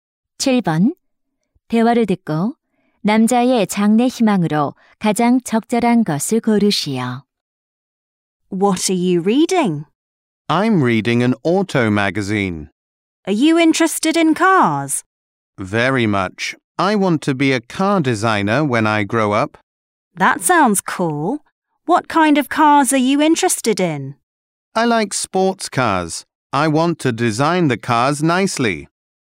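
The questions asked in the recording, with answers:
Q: 대화를 듣고 남자의 장래 희망으로 가장 적절한 것을 고르시오.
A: 자동차 디자이너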